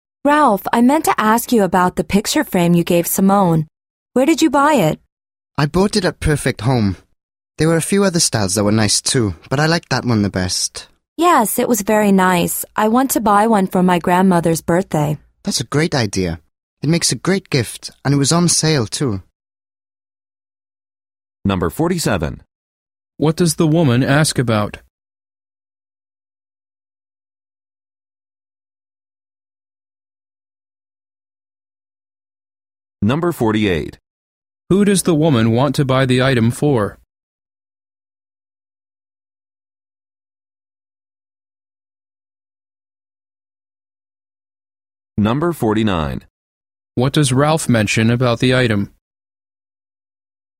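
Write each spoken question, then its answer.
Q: What does the woman ask about?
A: Where Ralph bought the picture frame

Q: Who does the woman want to buy the item for?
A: Her grandmother

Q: What does Ralph mention about the item?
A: It was on sale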